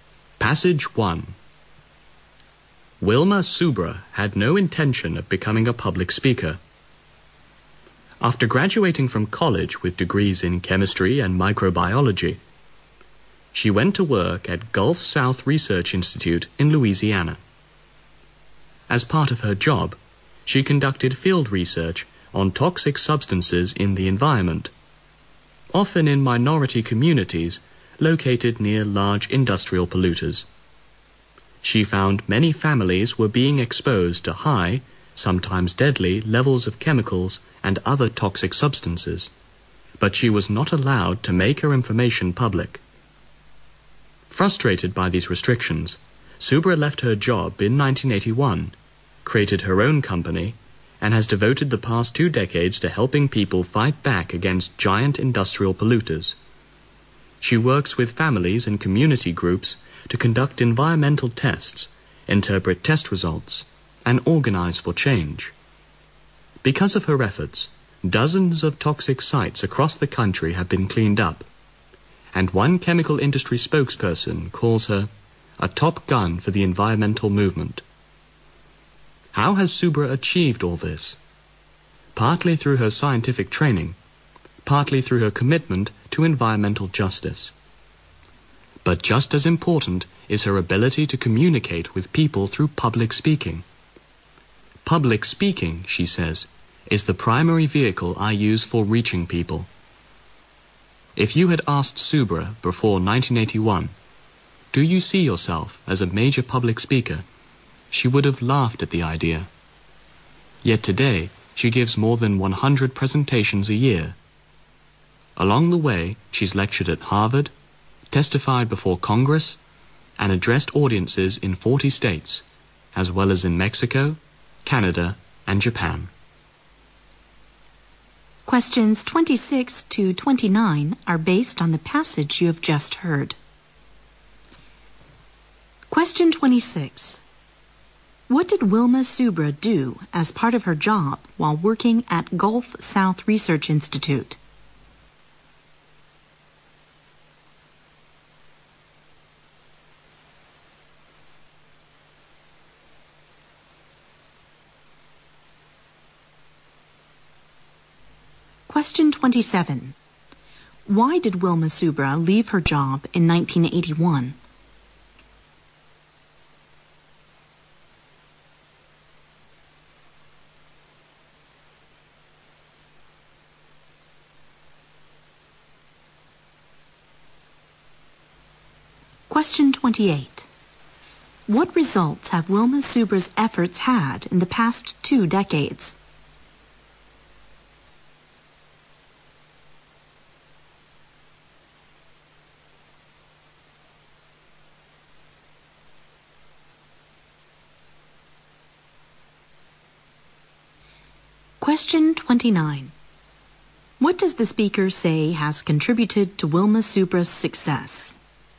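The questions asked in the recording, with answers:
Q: What did Wilma Subra do as part of her job while working at Gulf South Research Institute?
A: Field research on toxic substances in the environment

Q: Why did Wilma Subra leave her job in 1981?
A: She was not allowed to make her research findings public.

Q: What results have Wilma Subra's efforts had in the past 2 decades?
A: Dozens of toxic sites across the country have been cleaned up.

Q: What does the speaker say has contributed to Wilma Subra's success?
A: Her scientific training, her commitment to environmental justice and her public speaking ability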